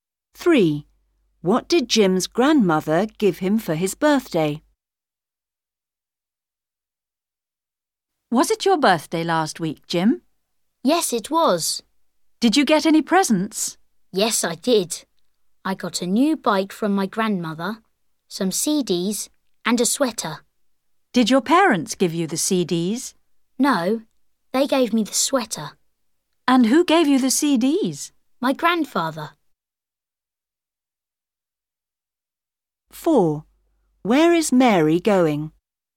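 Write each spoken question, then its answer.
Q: What did Jim's grandmother give him for his birthday?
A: A new bike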